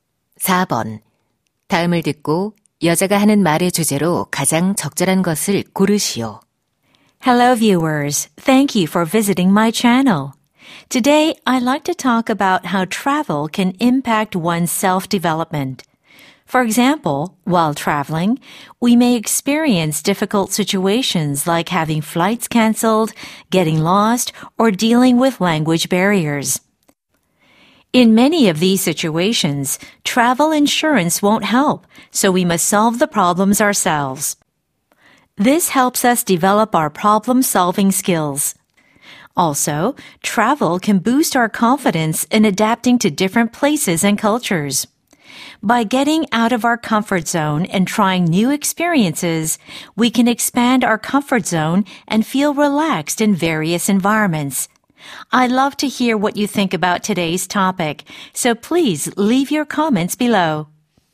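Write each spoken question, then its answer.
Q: 다음을 듣고 여자가 하는 말의 주제로 가장 적절한 것을 고르시오.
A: 여행이 자기 계발에 미치는 영향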